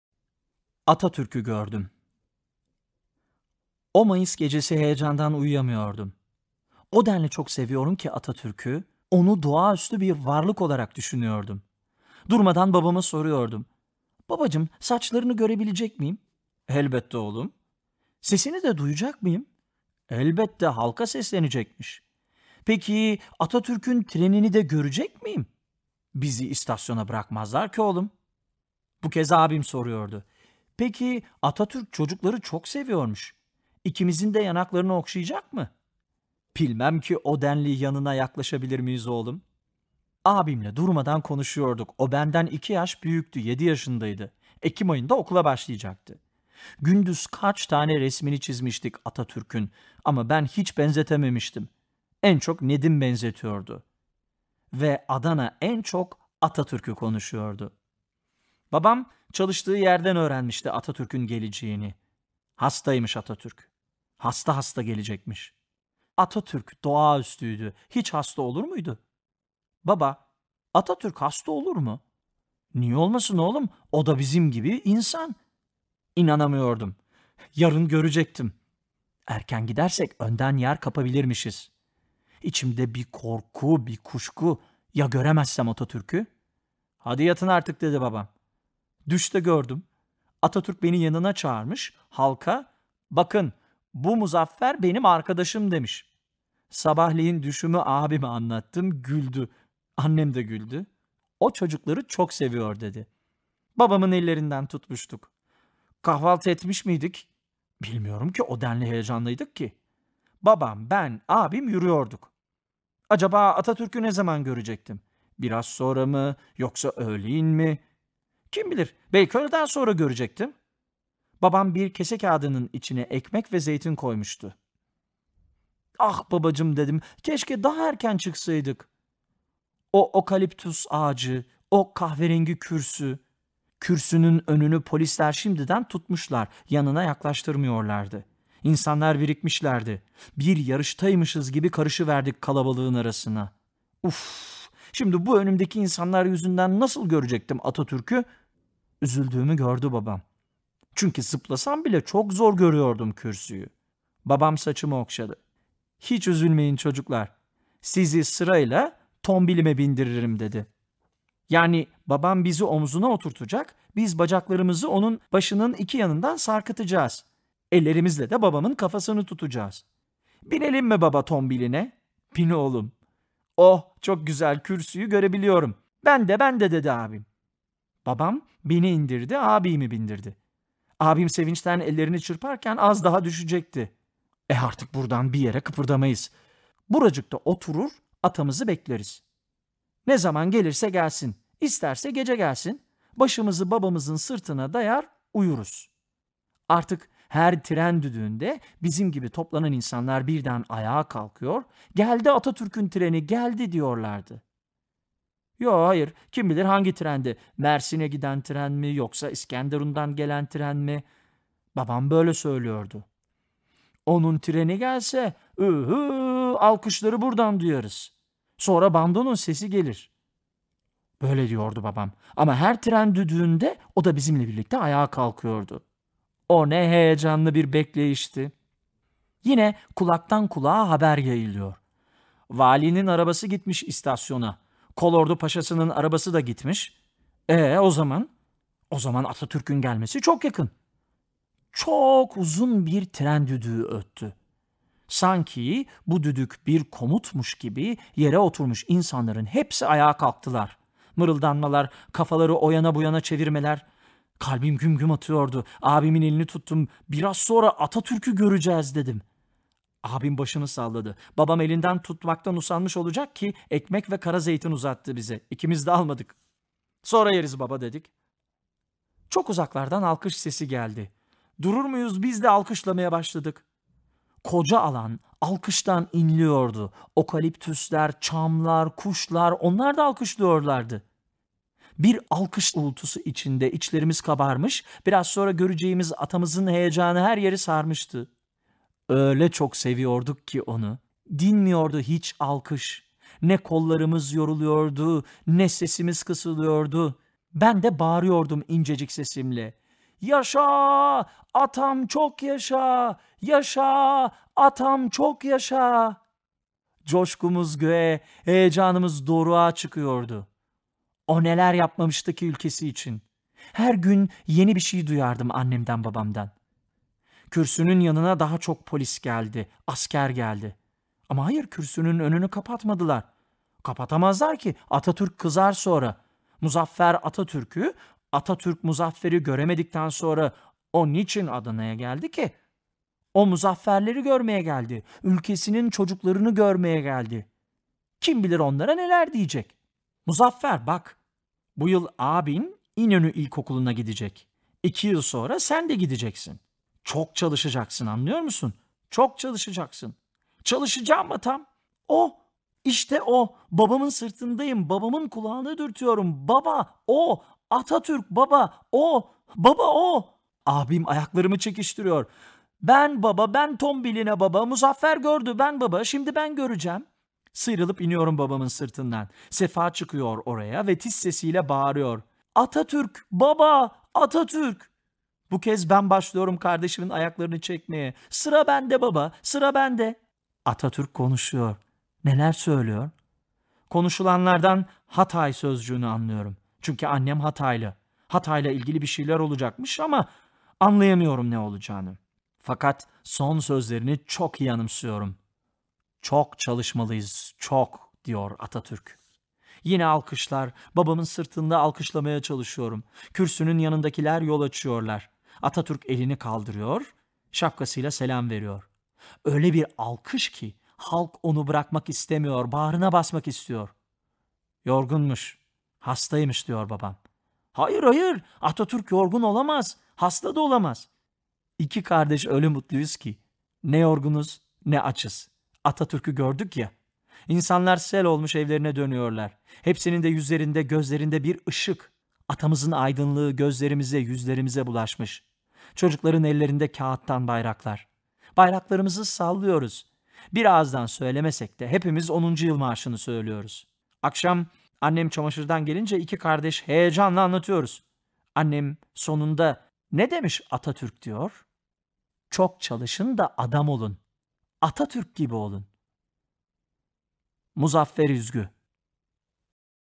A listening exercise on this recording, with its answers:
"Atatürk'ü Gördüm" metninden hareketle aşağıdaki soruları yanıtlayınız.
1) Metne göre Atatürk nereye, niçin gidecektir?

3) Muzaffer, Atatürk'ün Adana'ya gelişini hangi sebebe bağlıyor?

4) Halk, Atatürk'ü hangi ruh hâliyle bekliyor?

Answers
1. Atatürk Adana'ya halka seslenmek için gidecektir.
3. Atatürk'ün ülkesinin çocuklarını görmeye geldiğini düşünüyor.
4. Halk Atatürk'ü büyük bir heyecanla bekliyor.

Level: 8. Sınıf